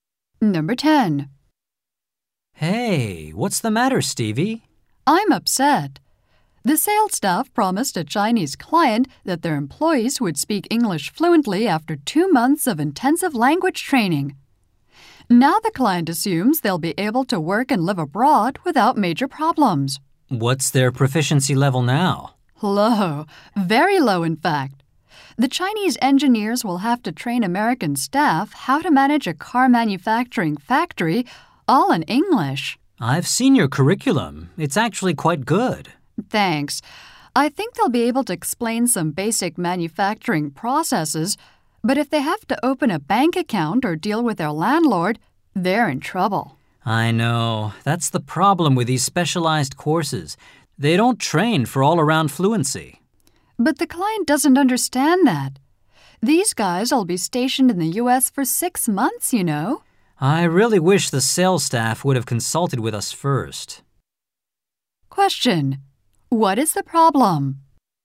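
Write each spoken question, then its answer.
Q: What is the problem?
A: The sales staff promised the client a level of English fluency the specialized course cannot deliver.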